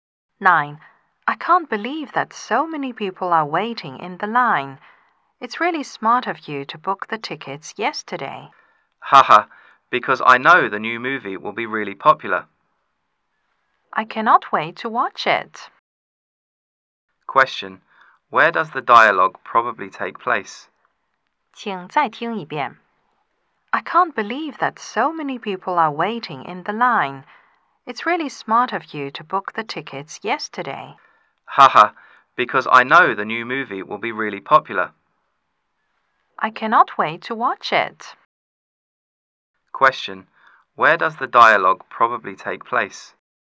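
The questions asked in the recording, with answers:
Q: Question, where does the dialogue probably take place?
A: At a cinema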